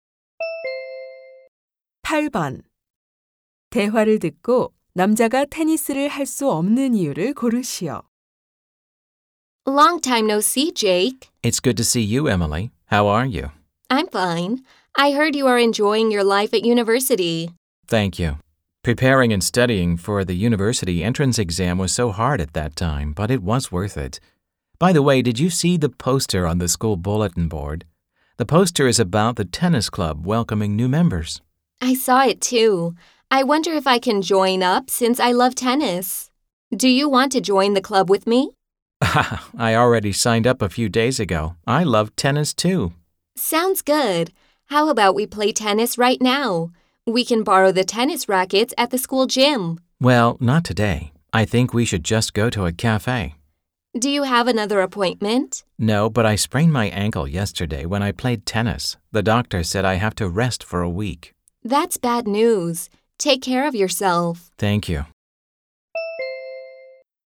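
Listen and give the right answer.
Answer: 발목을 삐어서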